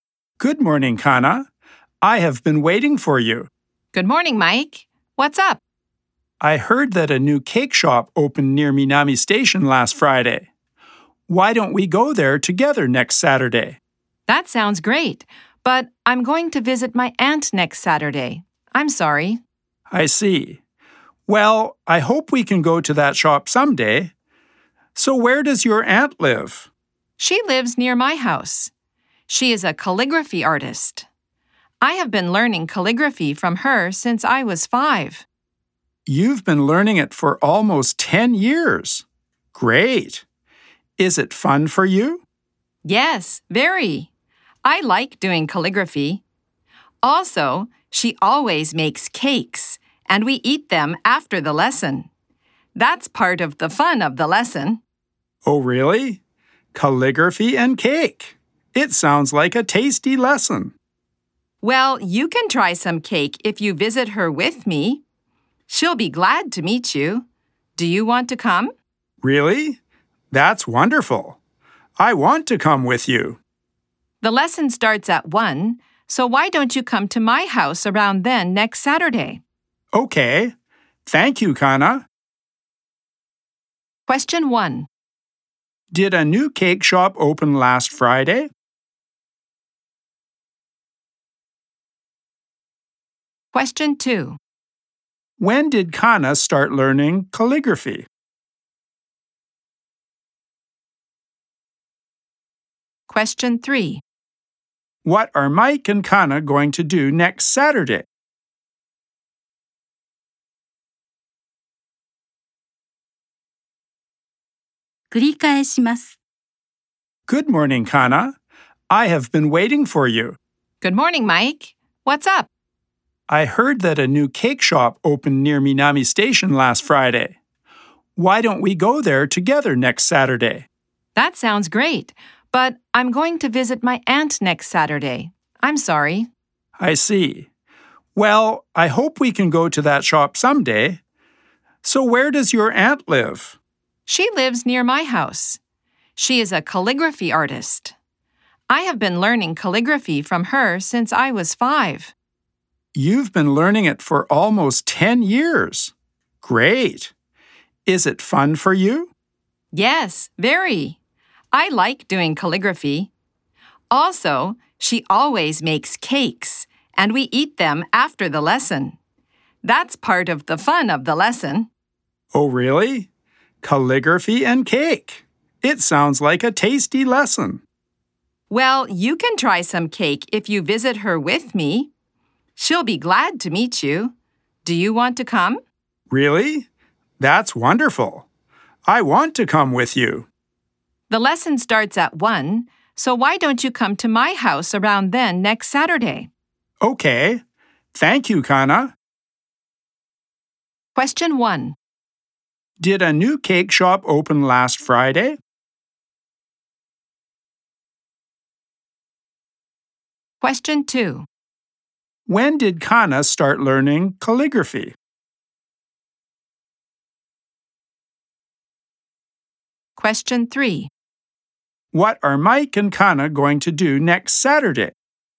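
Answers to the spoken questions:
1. Yes, it did.
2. When she was 5.
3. Visit Kana's aunt for a calligraphy lesson.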